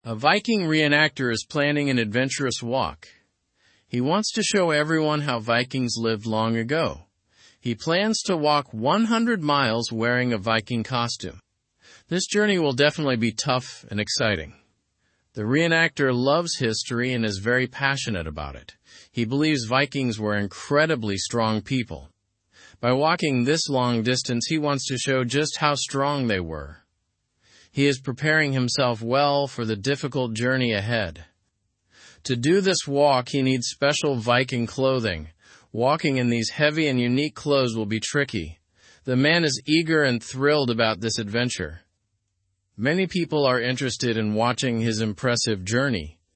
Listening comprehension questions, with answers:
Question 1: What does the Viking re-enactor want to do?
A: He wants to show how Vikings lived.

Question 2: How far does he plan to walk?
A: He plans to walk 100 miles.

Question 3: Why is the journey considered challenging?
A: It's challenging because of the distance and the special clothing.

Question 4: What does the re-enactor believe about Vikings?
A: He believes Vikings were very strong.

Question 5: What kind of clothing does the walk require?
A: It requires special Viking clothing.

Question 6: What emotion does the man feel about the journey?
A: He feels excited.

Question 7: What do many people want to do regarding his walk?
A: Many people want to watch his journey.

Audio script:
He wants to show everyone how Vikings lived long ago. He plans to walk 100 miles wearing a Viking costume. This journey will definitely be tough and exciting.
The re-enactor loves history and is very passionate about it. He believes Vikings were incredibly strong people. By walking this long distance, he wants to show just how strong they were. He is preparing himself well for the difficult journey ahead.
To do this walk, he needs special Viking clothing. Walking in these heavy and unique clothes will be tricky. The man is eager and thrilled about this adventure. Many people are interested in watching his impressive journey.

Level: Level 2